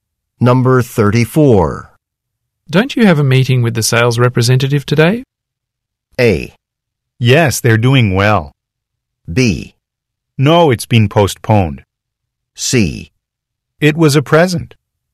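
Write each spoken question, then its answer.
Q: Don't you have a meeting with the sales representative today?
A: B: No, it's been postponed.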